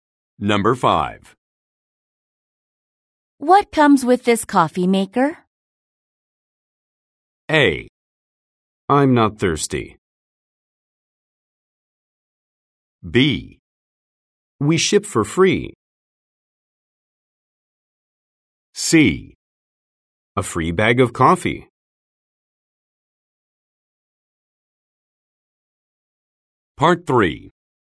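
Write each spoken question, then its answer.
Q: What comes with this coffee maker?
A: C: A free bag of coffee.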